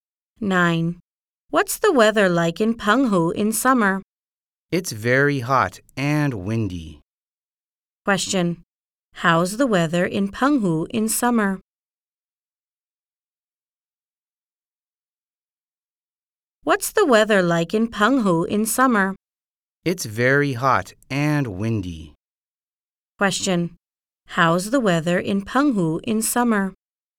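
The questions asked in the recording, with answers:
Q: How's the weather in Penghu in summer?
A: Very hot and windy.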